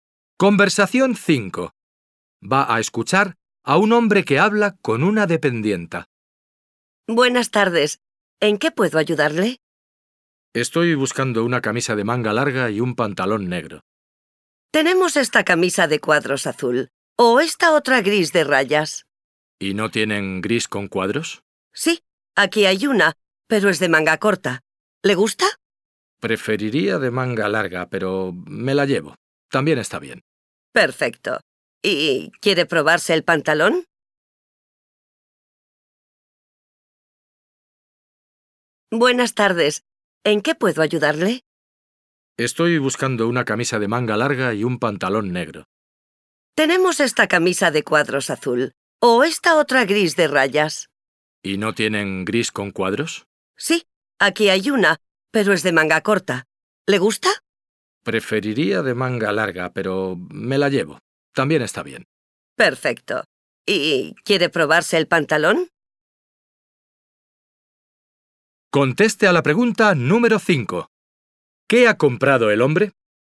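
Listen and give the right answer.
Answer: Una camisa gris de cuadros de manga corta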